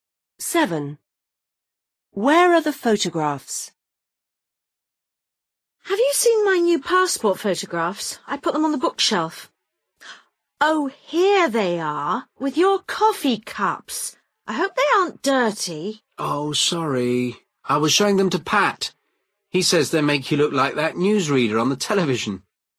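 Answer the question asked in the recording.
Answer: With the coffee cups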